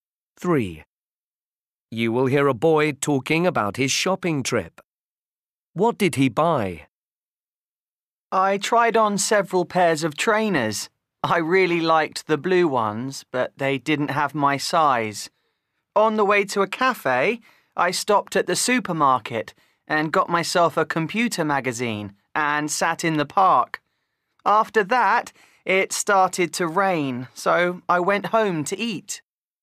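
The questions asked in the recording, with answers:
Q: What did he buy?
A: a computer magazine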